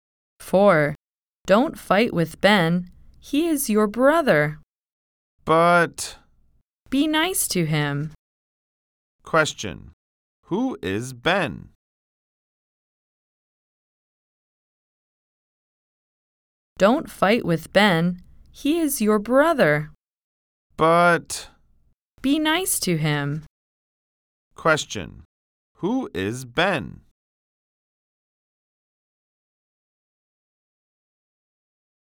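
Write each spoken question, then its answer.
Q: Who is Ben?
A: The listener's brother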